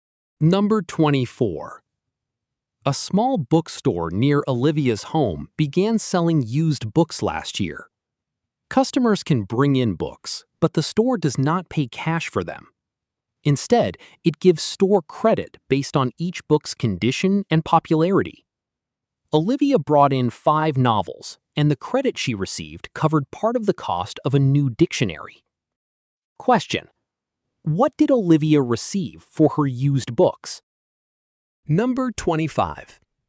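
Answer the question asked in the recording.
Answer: Store credit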